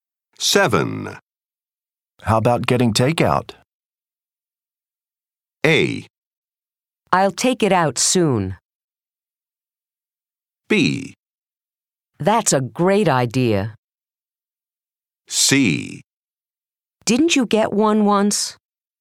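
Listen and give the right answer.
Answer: B: That's a great idea.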